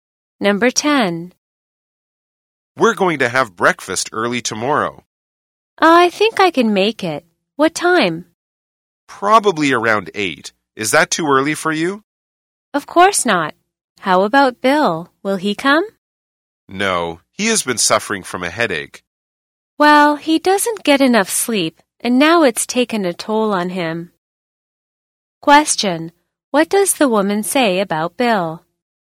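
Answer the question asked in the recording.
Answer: He doesn't get enough sleep, which has given him headaches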